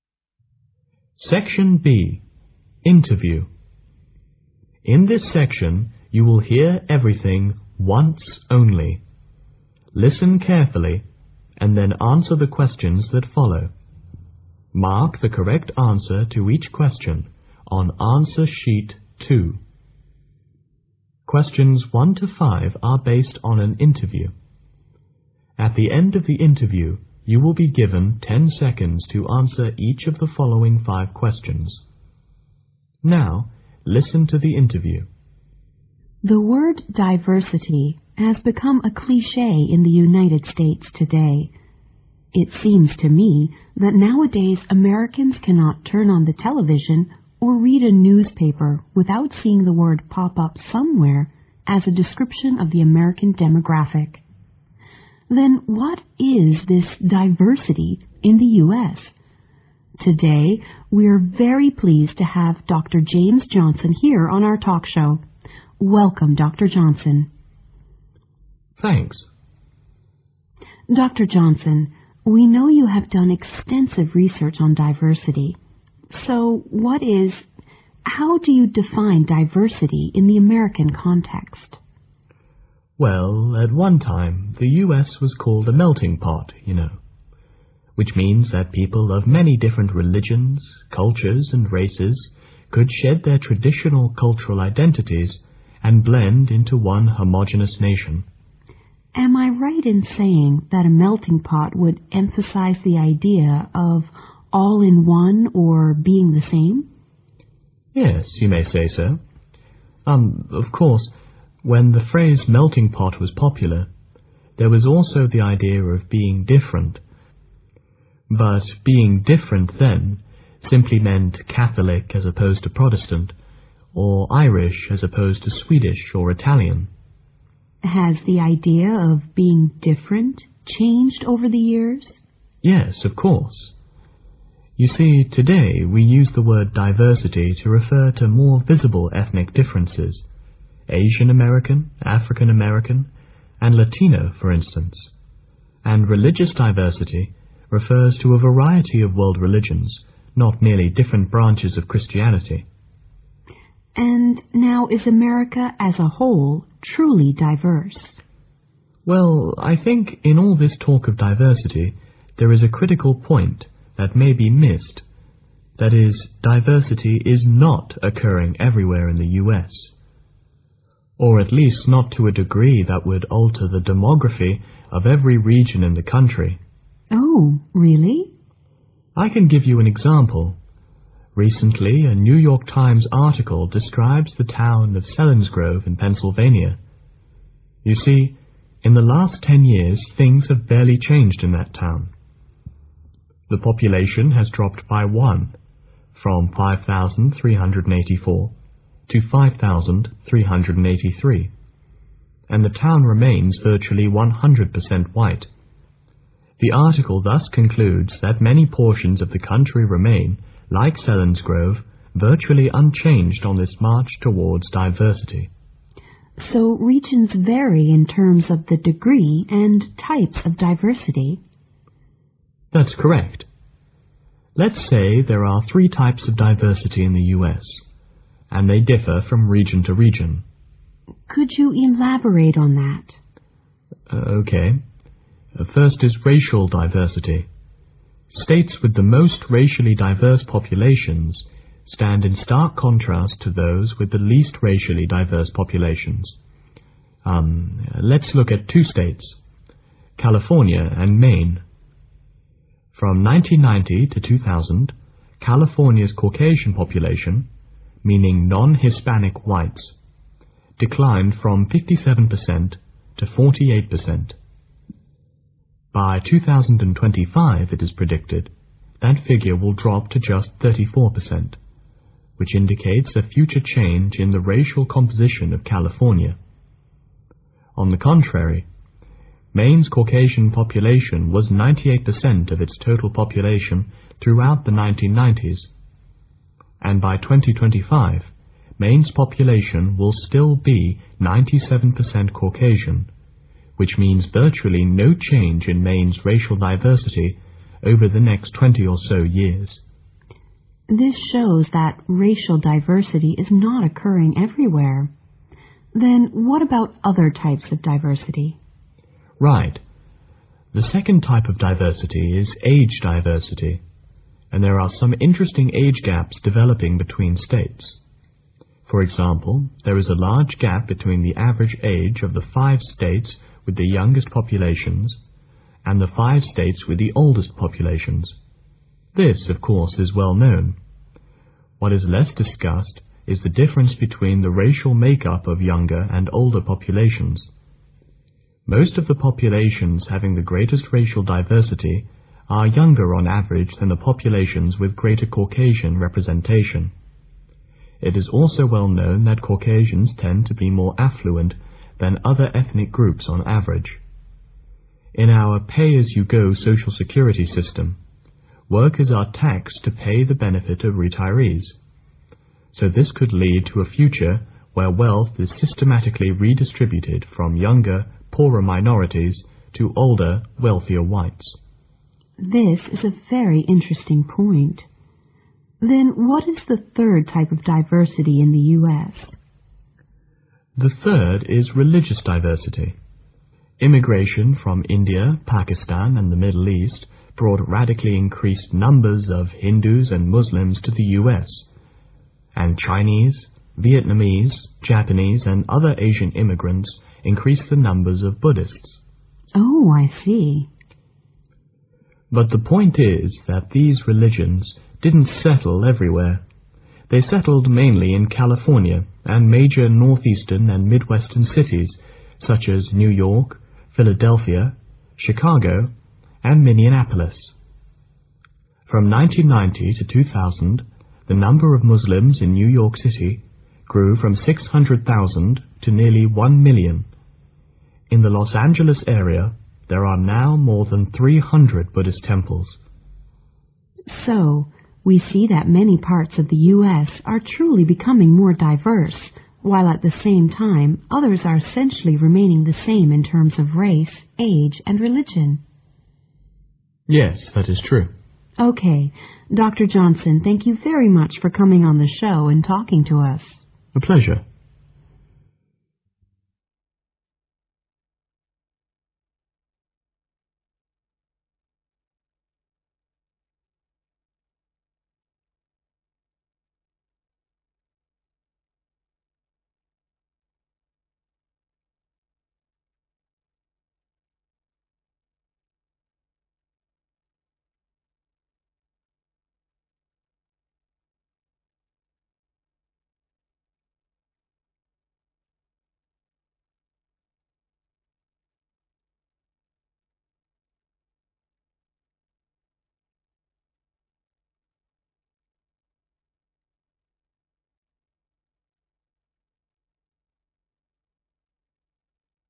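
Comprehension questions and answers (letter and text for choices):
Now listen to the interview.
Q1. According to Dr Johnson, diversity means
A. merging of different cultural identities.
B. more emphasis on homogeneity.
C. embracing of more ethnic differences.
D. acceptance of more branches of Christianity.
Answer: C. embracing of more ethnic differences.

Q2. According to the interview, which of the following statements in CORRECT?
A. Some places are more diverse than others.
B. Towns are less diverse than large cities.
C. Diversity can be seen everywhere.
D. American is a truly diverse country.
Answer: A. Some places are more diverse than others.

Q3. According to Dr Johnson, which place will witness a radical change in its racial makeup by 2025?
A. Maine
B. Selinsgrove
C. Philadelphia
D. California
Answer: D. California

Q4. During the interview Dr Johnson indicates that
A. greater racial diversity exists among younger populations.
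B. both older and younger populations are racially diverse.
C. age diversity could lead to pension problems.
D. older populations are more racially diverse.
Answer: A. greater racial diversity exists among younger populations.

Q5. According to the interview, religious diversity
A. was most evident between 1990 and 2000.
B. exists among Muslim immigrants.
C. is restricted to certain places in the US.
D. is spreading to more parts of the country.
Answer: C. is restricted to certain places in the US.

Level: 英语专业八级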